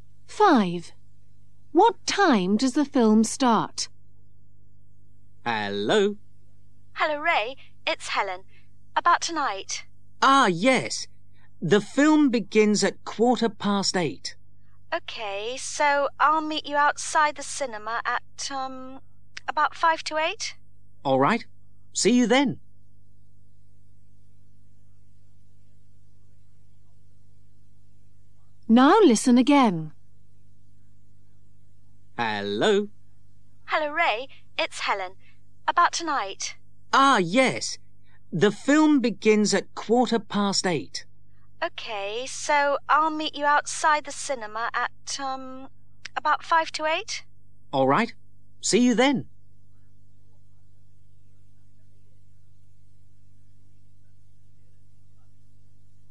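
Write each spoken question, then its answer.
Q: What time does the film start?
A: 8:15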